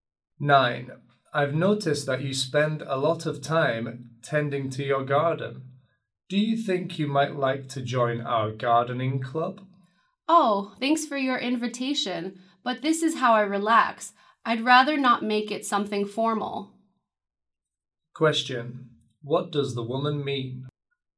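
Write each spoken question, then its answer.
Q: Question, what does the woman mean?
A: She doesn't want to join the club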